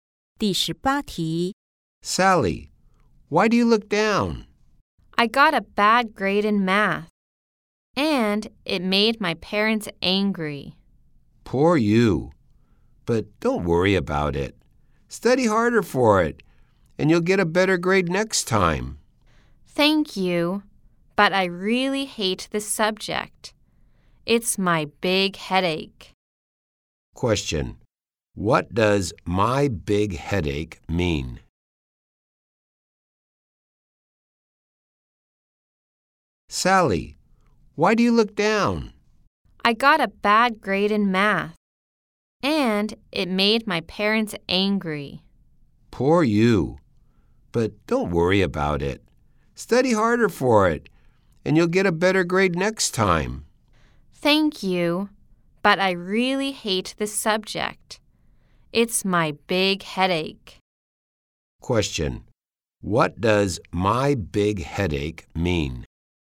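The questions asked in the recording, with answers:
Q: What does my big headache mean?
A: Math is a big problem for her (she hates it)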